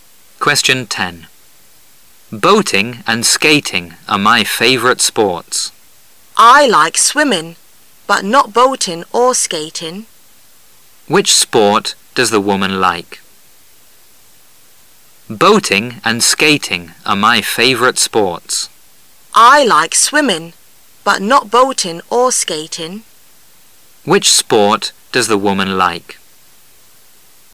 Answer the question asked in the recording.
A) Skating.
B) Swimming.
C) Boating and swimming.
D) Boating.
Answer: B) Swimming.

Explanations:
本题的选项在对话中都出现了,因此应注意听清问题,确定答案。